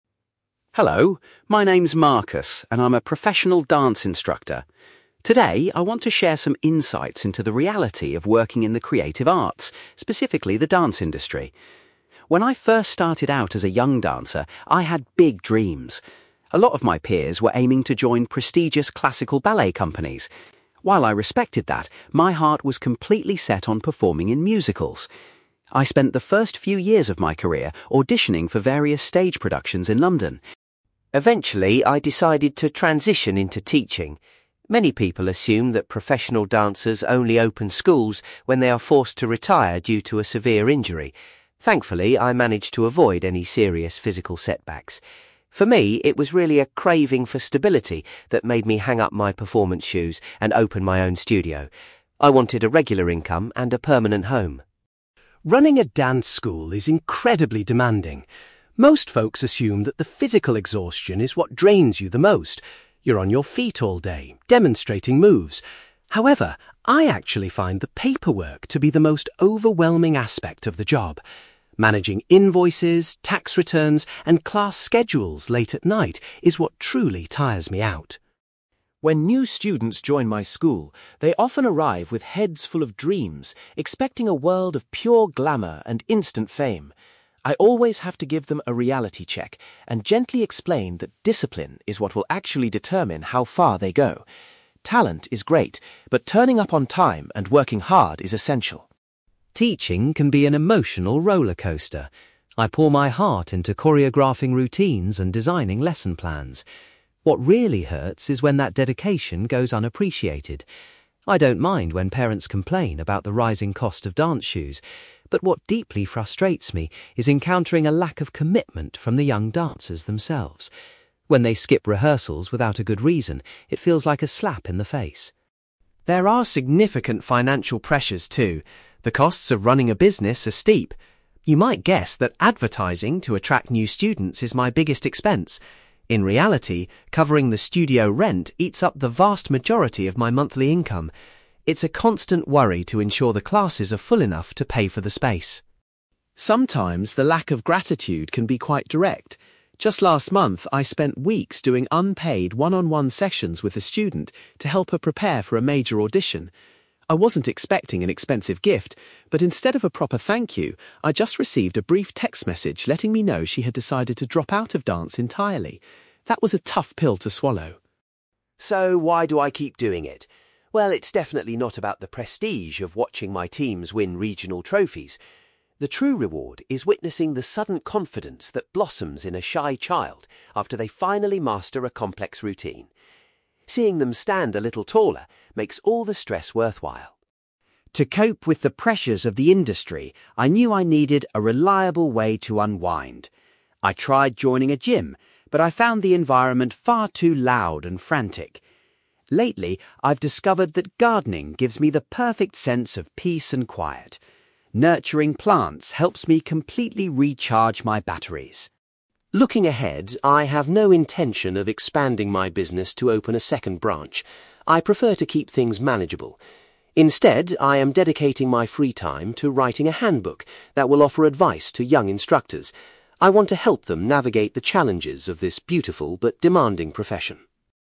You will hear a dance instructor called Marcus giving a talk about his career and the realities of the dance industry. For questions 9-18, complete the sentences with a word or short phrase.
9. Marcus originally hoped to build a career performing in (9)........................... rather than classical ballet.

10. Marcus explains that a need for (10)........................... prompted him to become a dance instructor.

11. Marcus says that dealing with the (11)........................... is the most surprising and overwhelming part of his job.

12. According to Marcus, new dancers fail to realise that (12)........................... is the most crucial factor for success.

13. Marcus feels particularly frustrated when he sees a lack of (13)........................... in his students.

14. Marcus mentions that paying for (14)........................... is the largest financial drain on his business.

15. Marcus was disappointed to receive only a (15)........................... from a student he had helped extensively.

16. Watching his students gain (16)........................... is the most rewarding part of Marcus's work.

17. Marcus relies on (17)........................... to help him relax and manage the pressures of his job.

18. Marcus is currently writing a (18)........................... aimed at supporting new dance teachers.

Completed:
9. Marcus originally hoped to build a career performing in musicals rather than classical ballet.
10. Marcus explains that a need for stability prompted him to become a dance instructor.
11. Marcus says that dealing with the paperwork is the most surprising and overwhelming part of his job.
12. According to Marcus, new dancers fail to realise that discipline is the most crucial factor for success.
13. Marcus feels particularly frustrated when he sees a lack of commitment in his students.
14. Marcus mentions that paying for studio rent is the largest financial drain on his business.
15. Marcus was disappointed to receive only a text message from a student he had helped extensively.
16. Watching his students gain confidence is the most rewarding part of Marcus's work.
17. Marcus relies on gardening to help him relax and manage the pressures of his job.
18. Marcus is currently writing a handbook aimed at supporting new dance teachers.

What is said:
Marcus: Hello, my name's Marcus, and I'm a professional dance instructor. Today I want to share some insights into the reality of working in the creative arts, specifically the dance industry. When I first started out as a young dancer, I had big dreams. A lot of my peers were aiming to join prestigious classical ballet companies. While I respected that, my heart was completely set on performing in musicals. I spent the first few years of my career auditioning for various stage productions in London.
Eventually, I decided to transition into teaching. Many people assume that professional dancers only open schools when they are forced to retire due to a severe injury. Thankfully, I managed to avoid any serious physical setbacks. For me, it was really a craving for stability that made me hang up my performance shoes and open my own studio. I wanted a regular income and a permanent home.
Running a dance school is incredibly demanding. Most folks assume that the physical exhaustion is what drains you the most. You're on your feet all day, demonstrating moves. However, I actually find the paperwork to be the most overwhelming aspect of the job. Managing invoices, tax returns, and class schedules late at night is what truly tires me out.
When new students join my school, they often arrive with heads full of dreams, expecting a world of pure glamour and instant fame. I always have to give them a reality check and gently explain that discipline is what will actually determine how far they go. Talent is great, but turning up on time and working hard is essential.
Teaching can be an emotional rollercoaster. I pour my heart into choreographing routines and designing lesson plans. What really hurts is when that dedication goes unappreciated. I don't mind when parents complain about the rising cost of dance shoes, but what deeply frustrates me is encountering a lack of commitment from the young dancers themselves. When they skip rehearsals without a good reason, it feels like a slap in the face.
There are significant financial pressures, too. The costs of running a business are steep. You might guess that advertising to attract new students is my biggest expense. In reality, covering the studio rent eats up the vast majority of my monthly income. It's a constant worry to ensure the classes are full enough to pay for the space.
Sometimes, the lack of gratitude can be quite direct. Just last month, I spent weeks doing unpaid, one-on-one sessions with a student to help her prepare for a major audition. I wasn't expecting an expensive gift, but instead of a proper thank-you, I just received a brief text message letting me know she had decided to drop out of dance entirely. That was a tough pill to swallow.
So, why do I keep doing it? Well, it's definitely not about the prestige of watching my teams win regional trophies. The true reward is witnessing the sudden confidence that blossoms in a shy child after they finally master a complex routine. Seeing them stand a little taller makes all the stress worthwhile.
To cope with the pressures of the industry, I knew I needed a reliable way to unwind. I tried joining a gym, but I found the environment far too loud and frantic. Lately, I've discovered that gardening gives me the perfect sense of peace and quiet. Nurturing plants helps me completely recharge my batteries.
Looking ahead, I have no intention of expanding my business to open a second branch. I prefer to keep things manageable. Instead, I am dedicating my free time to writing a handbook that will offer advice to young instructors. I want to help them navigate the challenges of this beautiful but demanding profession.

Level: B2